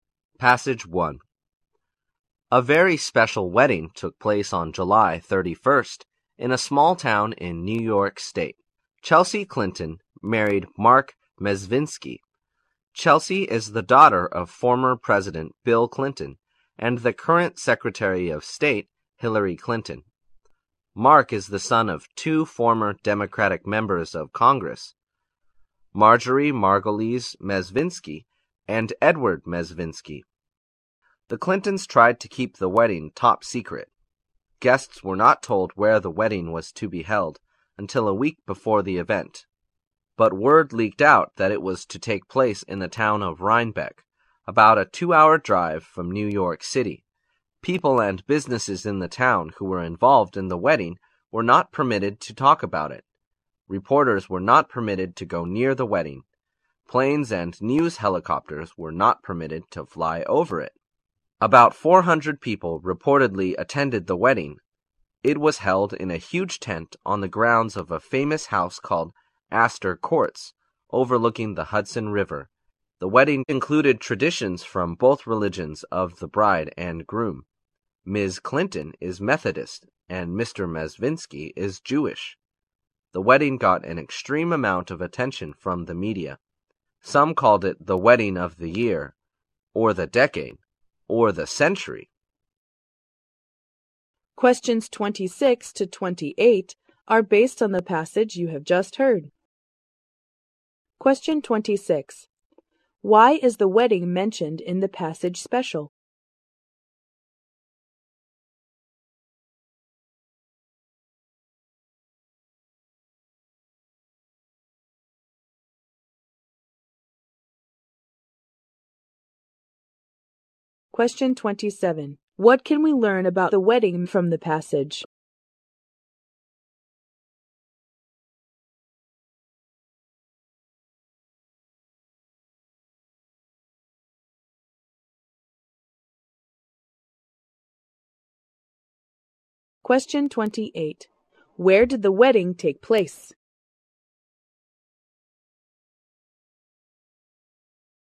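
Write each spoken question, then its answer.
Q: Why is the wedding mentioned in the passage special?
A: The bride, Chelsea Clinton, is the daughter of former President Bill Clinton and Secretary of State Hillary Clinton

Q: Where did the wedding take place?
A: In Rhinebeck, New York, in a tent at Astor Courts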